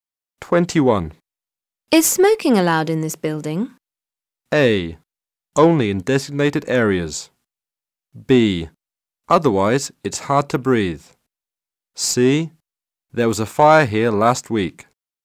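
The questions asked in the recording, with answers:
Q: Is smoking allowed in this building?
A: A: Only in designated areas.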